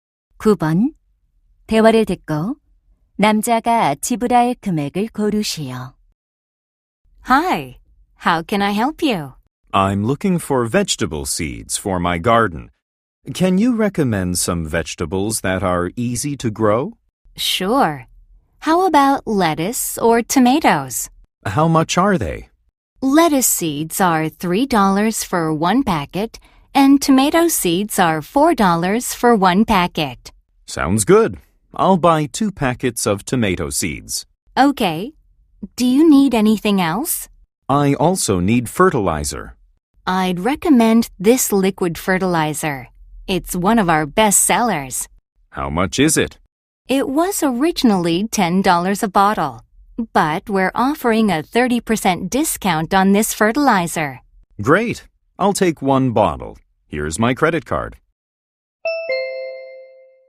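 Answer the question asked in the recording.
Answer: $15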